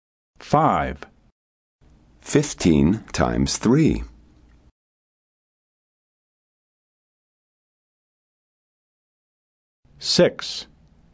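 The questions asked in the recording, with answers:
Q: 15 times 3.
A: 45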